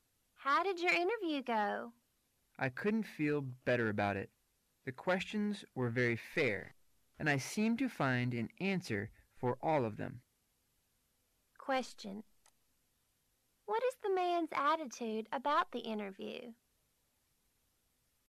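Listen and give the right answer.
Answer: He feels confident and positive about it

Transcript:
[听力原文] W: How did your interview go? M: I couldn't feel better about it. The questions were very fair, and I seemed to find an answer for all of them. Q: What is the man's attitude about the interview?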